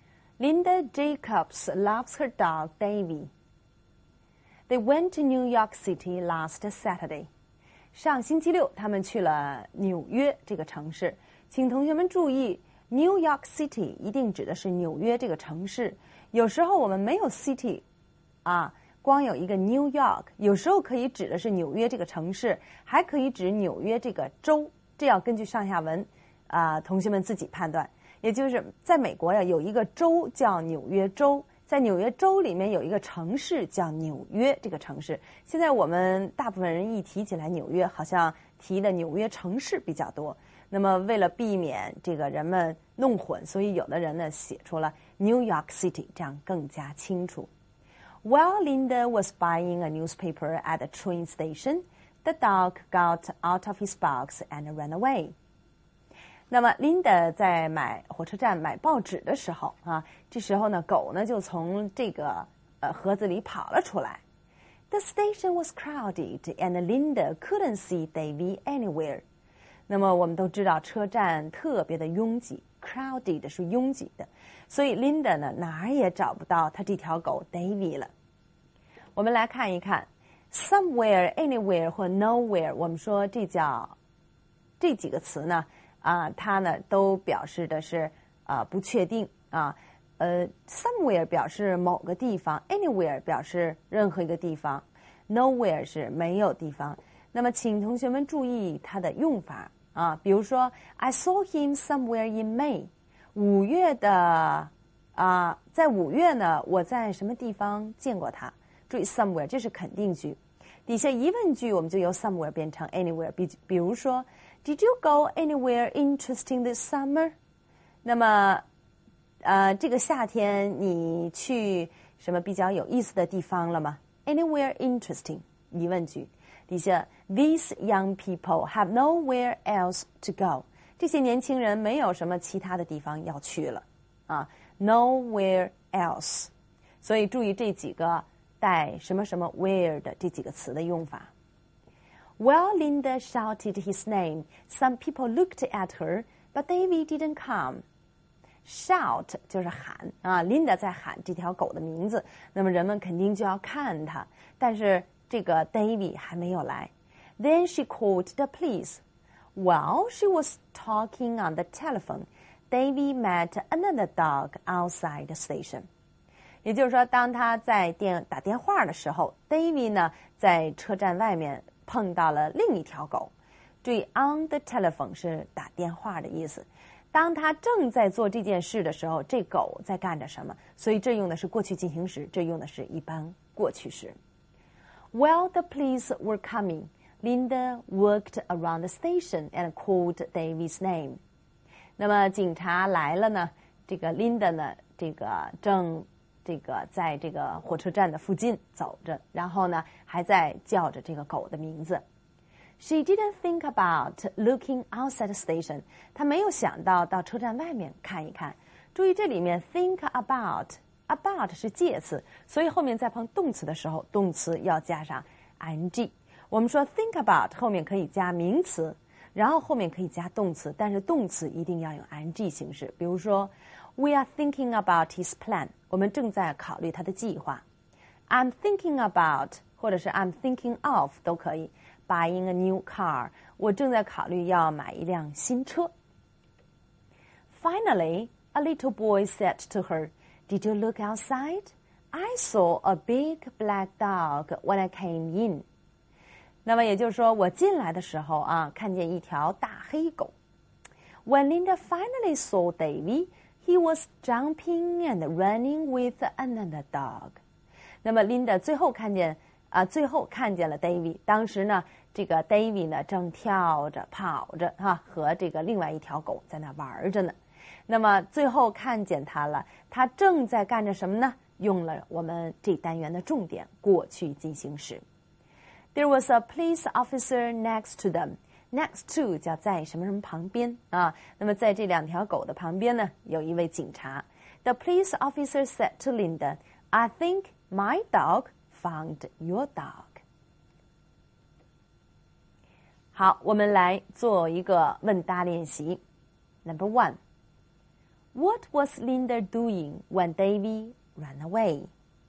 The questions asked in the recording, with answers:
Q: What was Linda doing when David ran away?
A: Linda was buying a newspaper. At the train station.